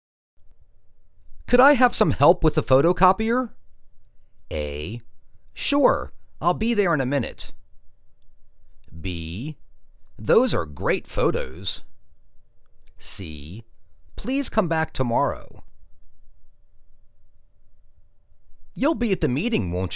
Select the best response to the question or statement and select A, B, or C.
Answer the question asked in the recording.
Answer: Sure, I'll be there in a minute.